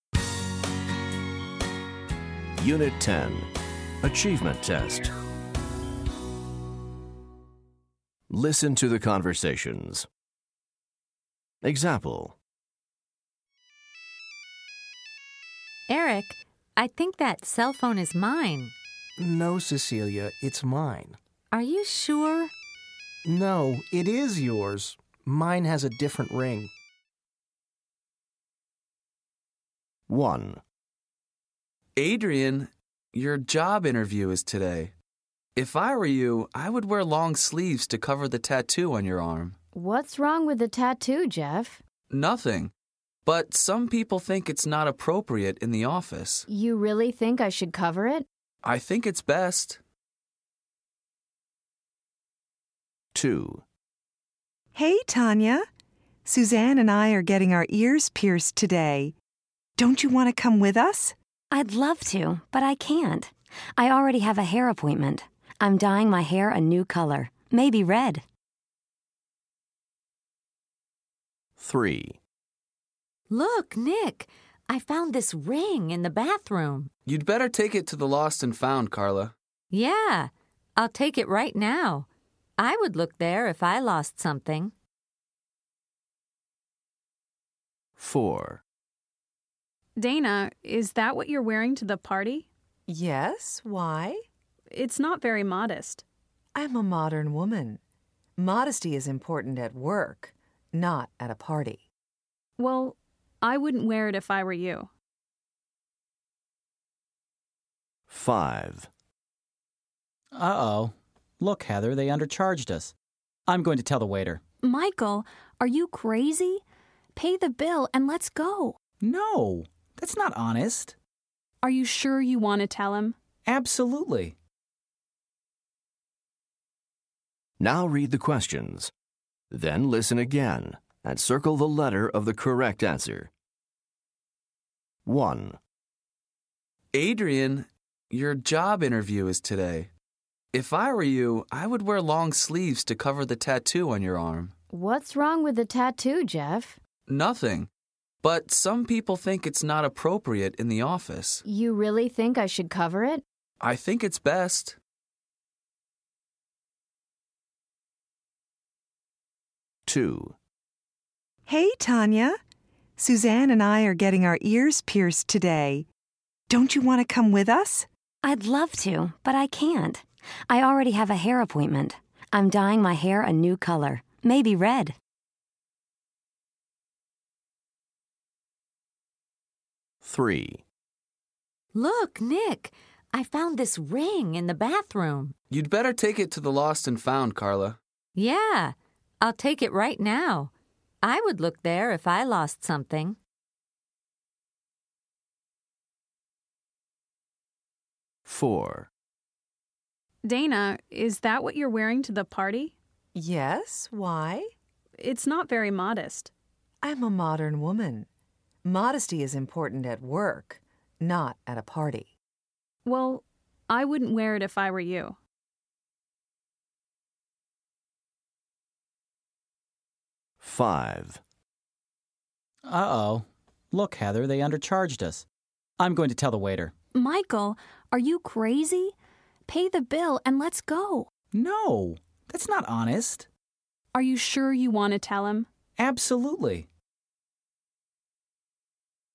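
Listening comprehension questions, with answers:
Listen to the conversations. Then choose the correct answers.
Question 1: What does Jeff think Adrienne should do?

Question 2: How does Tanya feel about piercing her ears?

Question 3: What is Carla going to do?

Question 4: Dana thinks that modesty is important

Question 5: What does Michael plan to do?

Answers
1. Wear long sleeves to cover her tattoo at the job interview.
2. She'd love to, but she can't because she has a hair appointment.
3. Take the ring to the lost and found.
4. at work, not at a party
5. Tell the waiter that they were undercharged.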